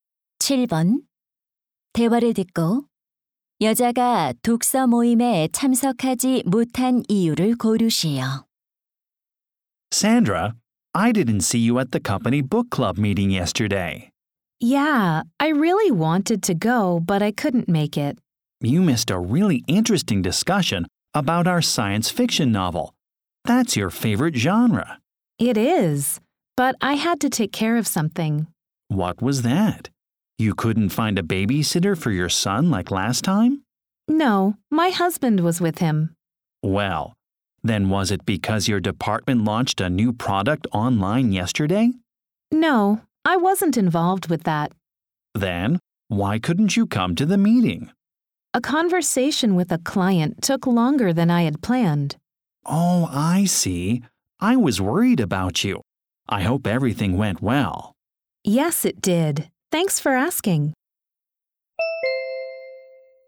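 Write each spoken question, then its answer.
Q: 대화를 듣고 여자가 독서 모임에 참석하지 못한 이유를 고르시오.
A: 고객과의 대화가 예정보다 길어져서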